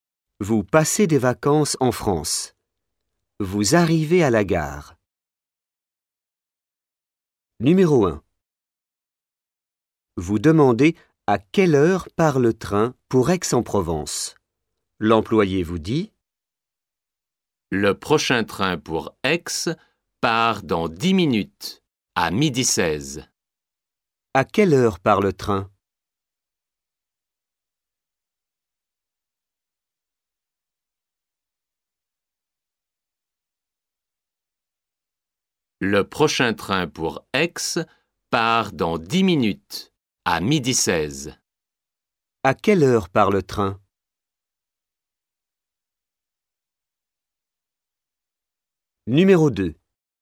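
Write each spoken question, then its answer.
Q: À quelle heure part le train?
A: À 12h16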